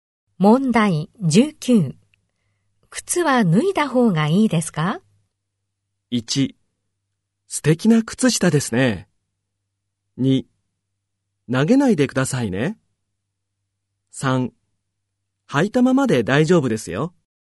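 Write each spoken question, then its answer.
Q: 靴は脱いだ方がいいですか?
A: 3: 履いたままで大丈夫ですよ。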